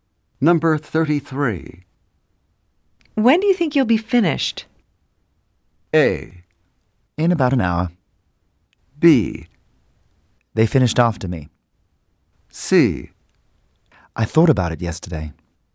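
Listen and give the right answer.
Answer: A: In about an hour.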